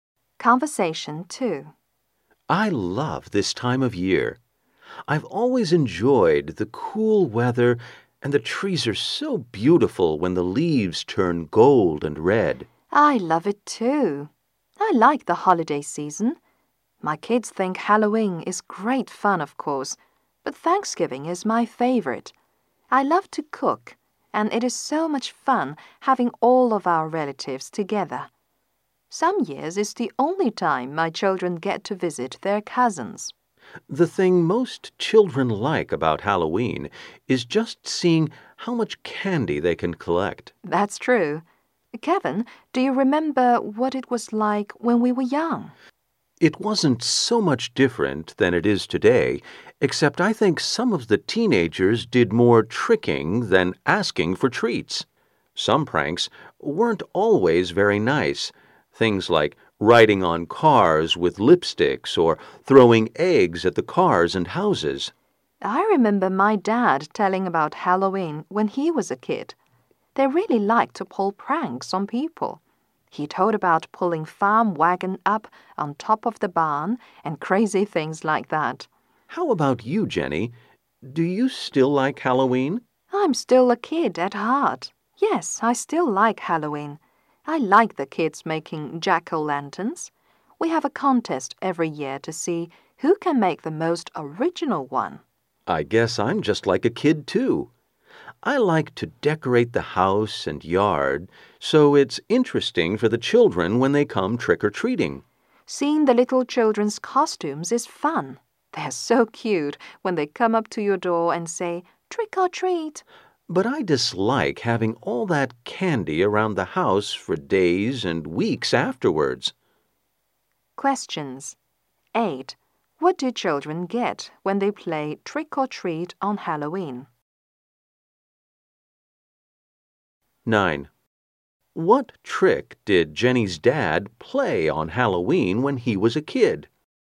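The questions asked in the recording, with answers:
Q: What do children get when they play trick or treat on Halloween?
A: Candy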